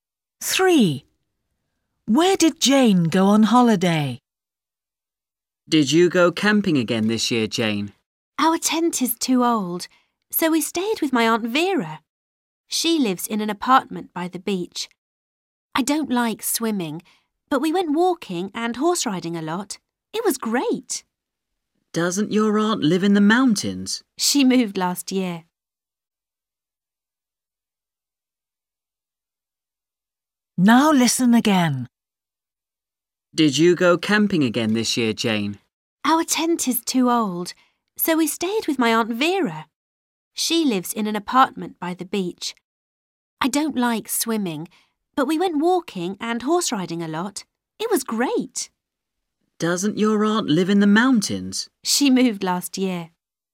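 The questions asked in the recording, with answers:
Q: Where did Jane go on holiday?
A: To her aunt's apartment by the beach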